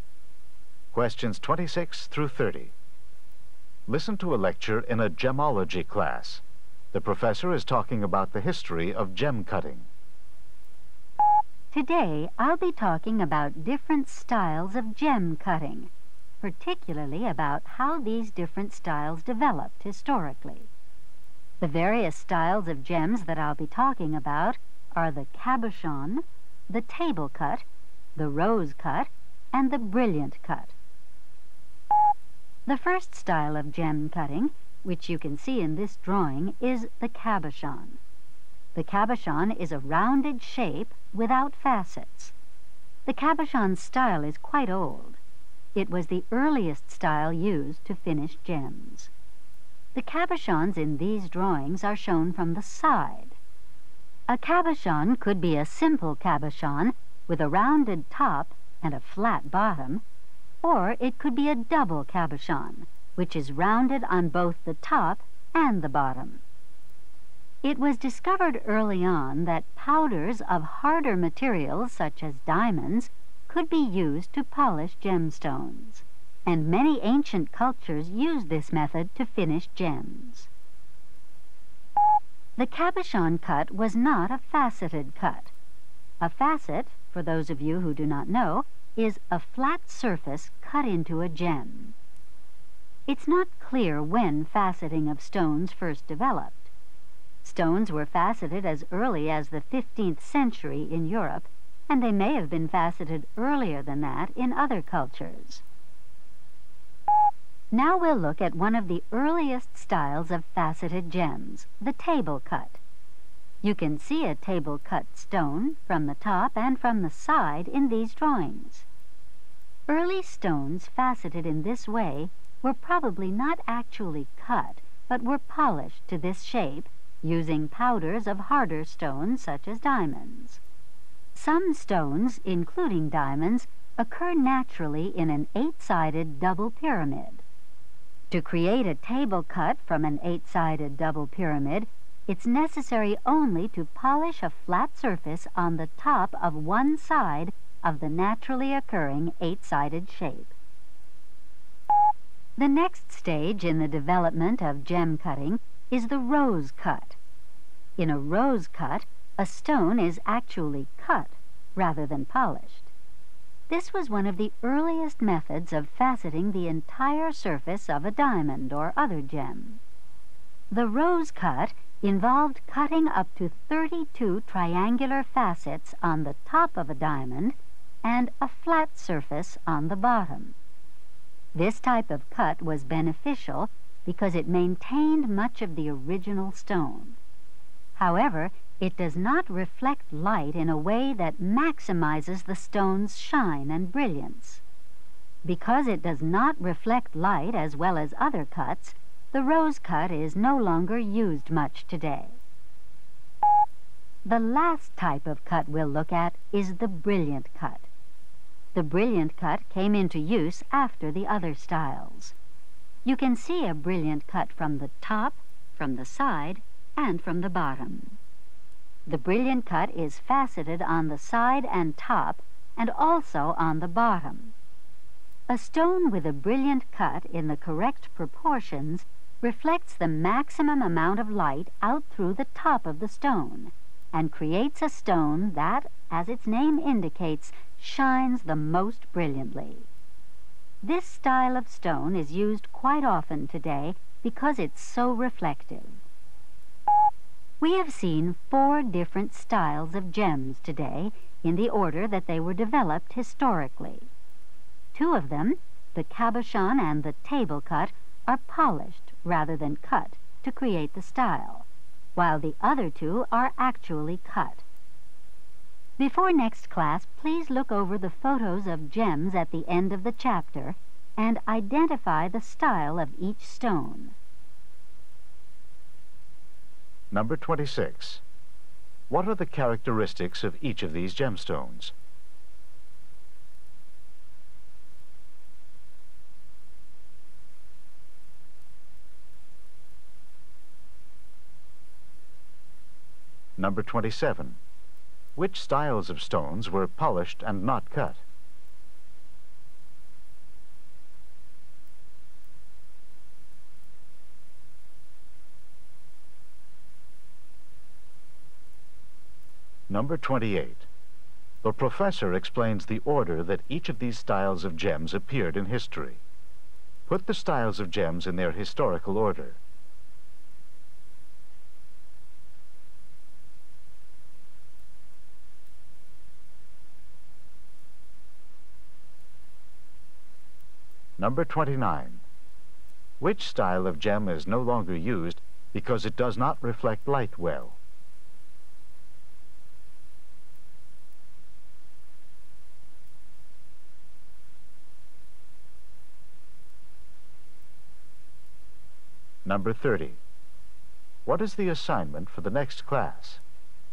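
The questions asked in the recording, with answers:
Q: Which styles of stones were polished and not cut?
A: The cabochon and the table cut

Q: Put the styles of gems in their historical order.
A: Cabochon, table cut, rose cut, brilliant cut

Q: Which style of gem is no longer used because it does not reflect light well?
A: The rose cut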